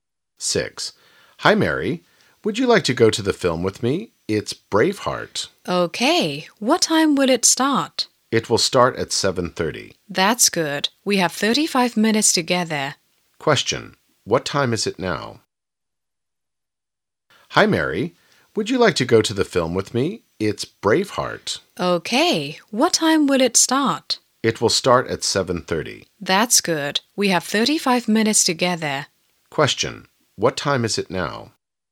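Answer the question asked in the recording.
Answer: 6:55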